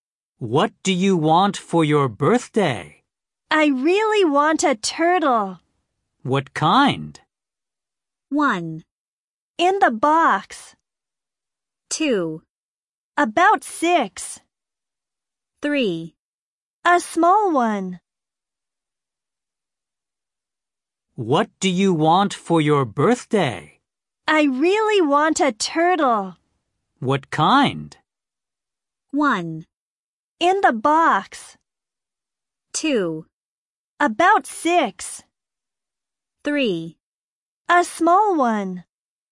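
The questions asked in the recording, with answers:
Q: What kind?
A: 3: A small one.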